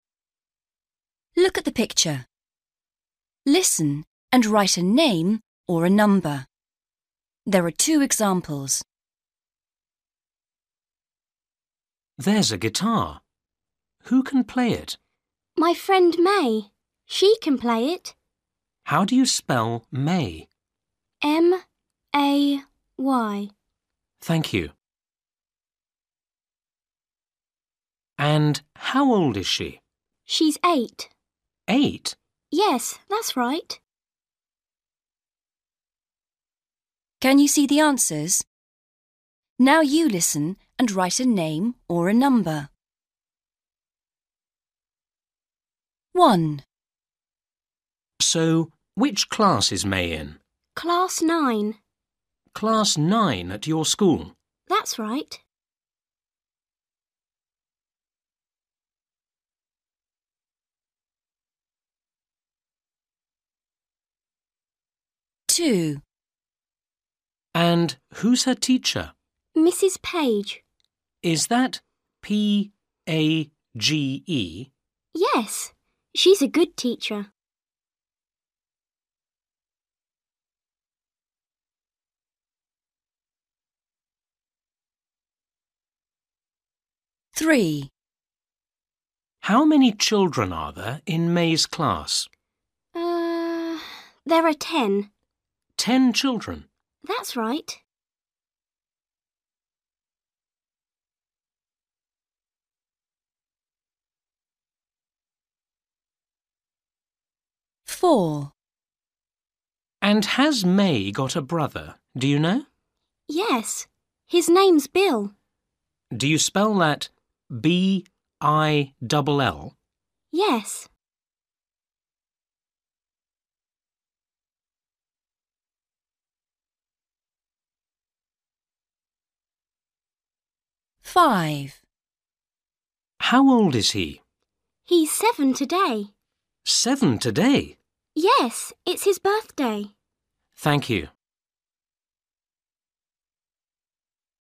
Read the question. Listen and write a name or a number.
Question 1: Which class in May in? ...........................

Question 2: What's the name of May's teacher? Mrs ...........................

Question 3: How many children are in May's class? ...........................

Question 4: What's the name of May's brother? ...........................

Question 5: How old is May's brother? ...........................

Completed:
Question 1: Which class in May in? (class) 9/nine
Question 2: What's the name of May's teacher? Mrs Page
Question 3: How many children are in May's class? 10/ten (children)
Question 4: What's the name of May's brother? Bill
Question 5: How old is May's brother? 7/seven (year(s) (old)) (today)

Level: Starters